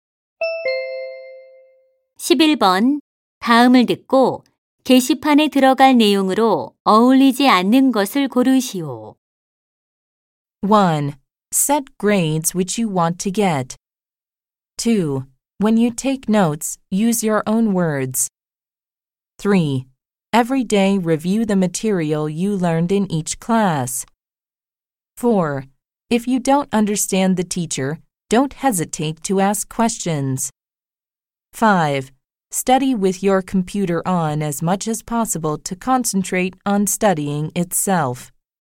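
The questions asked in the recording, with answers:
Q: 다음을 듣고 게시판에 들어갈 내용으로 어울리지 않는 것을 고르시오.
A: 5: Study with your computer on as much as possible to concentrate on studying itself.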